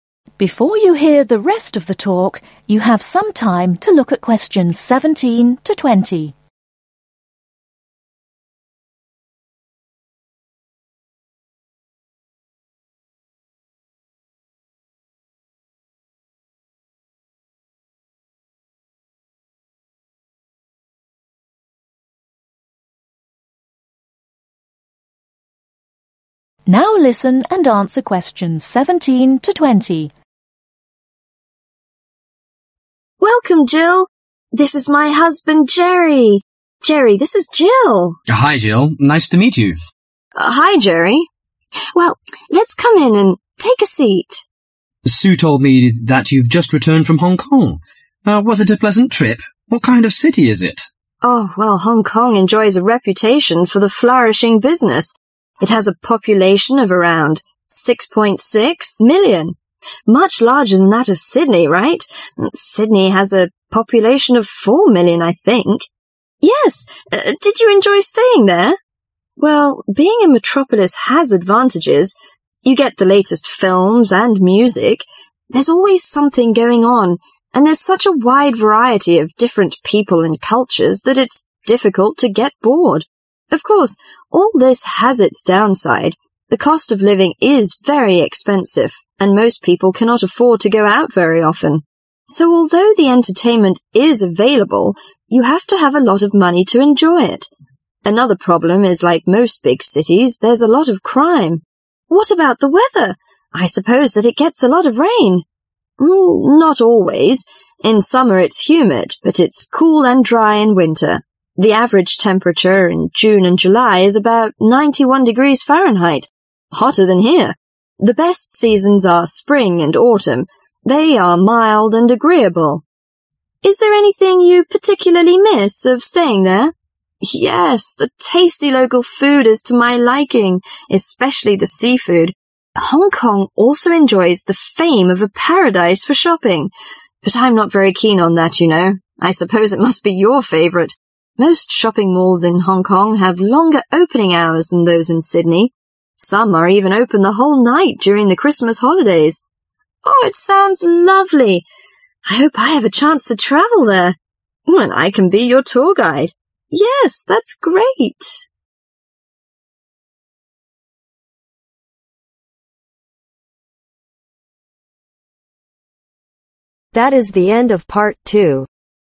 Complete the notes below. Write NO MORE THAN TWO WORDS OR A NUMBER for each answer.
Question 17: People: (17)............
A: 6.6 Million

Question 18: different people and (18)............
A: Culture

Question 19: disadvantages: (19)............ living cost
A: Expensive

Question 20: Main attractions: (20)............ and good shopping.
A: Seafood